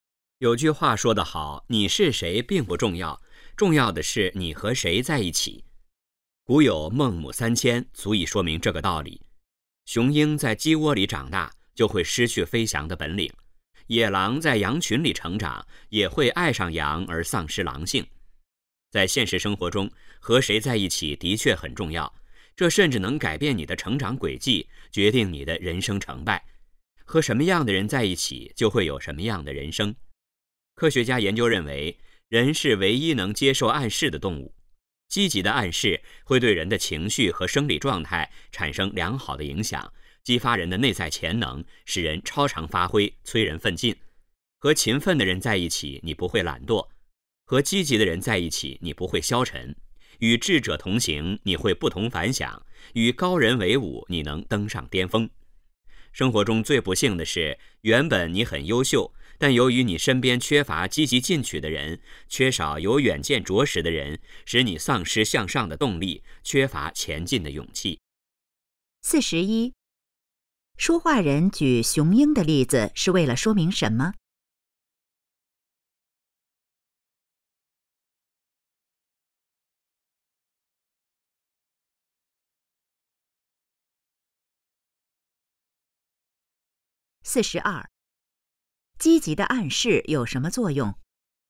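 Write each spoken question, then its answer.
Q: 书画人举雄鹰的例子是为了说明什么?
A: 和谁在一起很重要,环境会影响人

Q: 积极的暗示有什么作用?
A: 激发人的内在潜能,使人超常发挥,催人奋进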